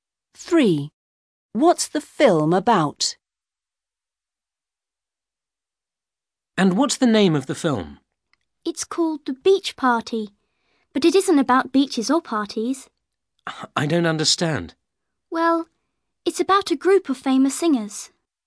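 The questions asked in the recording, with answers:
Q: What's the film about?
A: A group of famous singers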